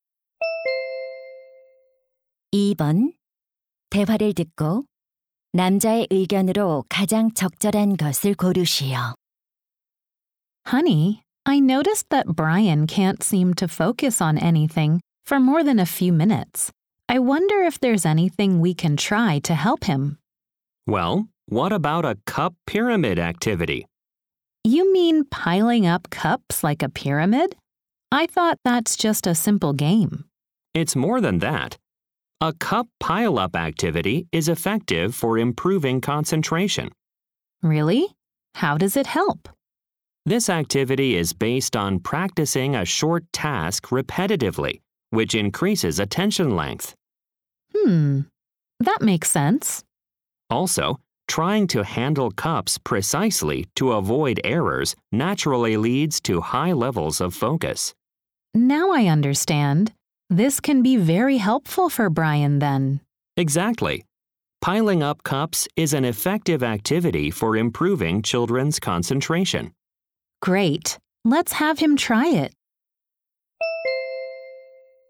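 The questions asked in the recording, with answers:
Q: 대화를 듣고 남자의 의견으로 가장 적절한 것을 고르시오.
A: 컵 쌓기 활동은 아이들의 집중력 향상에 효과적이다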